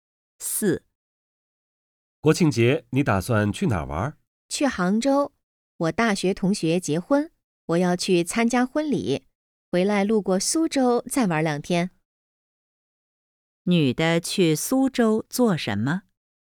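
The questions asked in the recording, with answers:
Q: 女的去苏州做什么?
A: 玩两天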